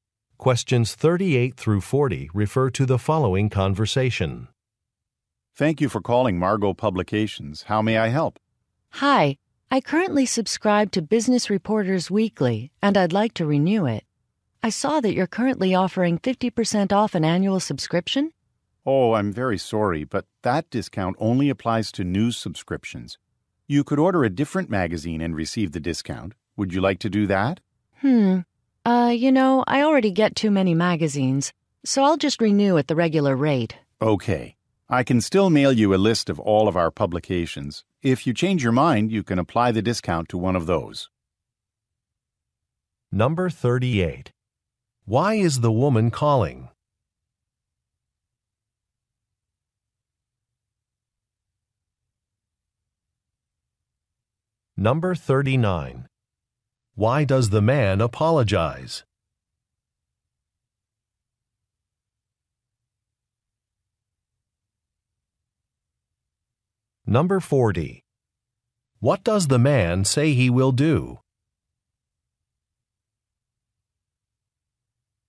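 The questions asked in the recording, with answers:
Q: Why is the woman calling?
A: To renew a magazine subscription

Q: Why does the man apologize?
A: The discount does not apply to her subscription

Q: What does the man say he will do?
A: Mail her a list of publications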